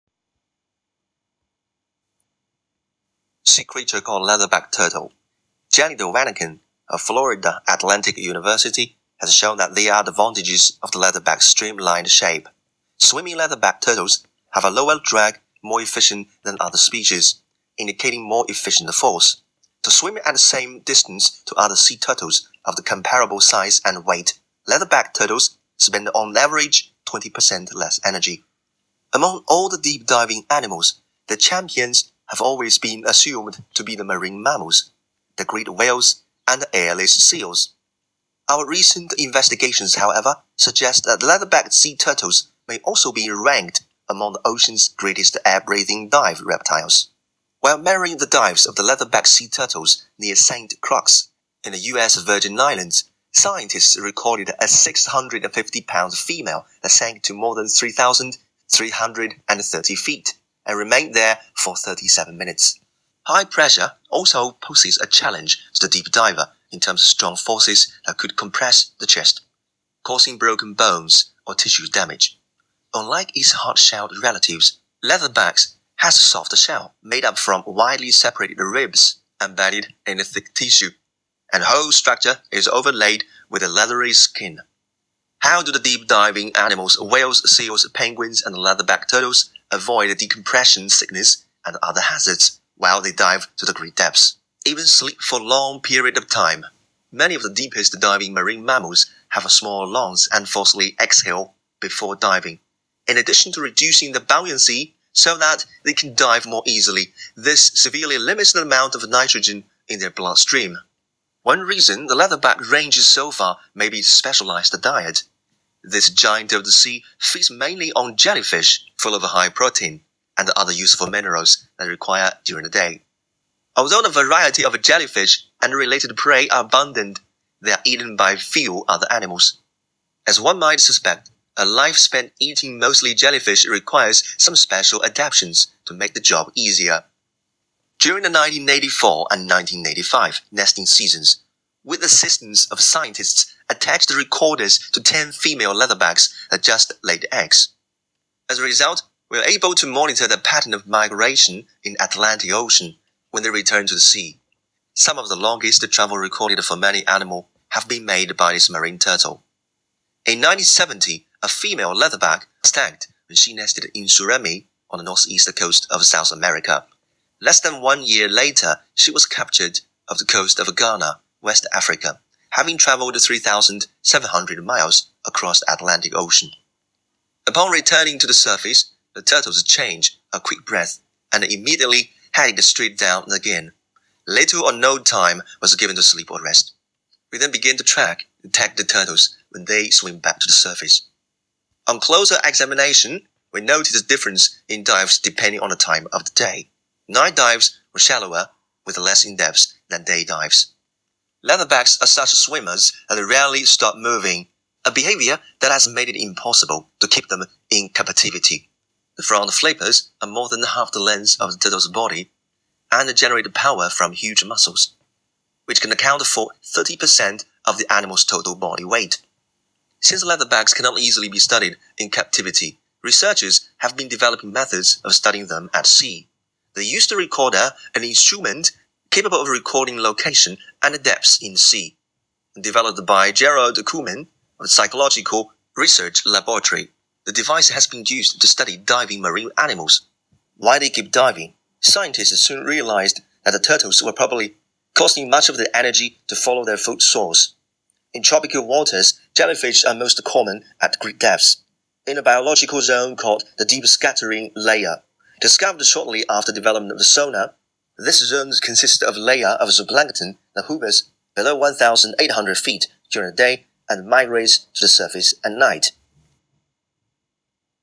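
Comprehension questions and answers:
Complete the notes below. Write ONE WORD ONLY for each answer.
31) The advantageous 31 of leatherback turtles makes them swim efficiently than others.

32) It is one of the deepest 32 reptile.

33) Shell is 33 not bony to avoid from high pressure.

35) Main food is jellyfish contains high proportion in 35 and mineral.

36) Scientists can learn their 36 pattern in Atlantic Ocean.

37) Scientists can start tracking when the turtle reaches 37.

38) Huge front flipper can produce 38 from strong muscles.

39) Monitor not only location but also the 39 in the sea.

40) Leatherbacks are found using more 40 to search food.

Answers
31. shape
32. diving
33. soft
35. protein
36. migration
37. surface
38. power
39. depths
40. energy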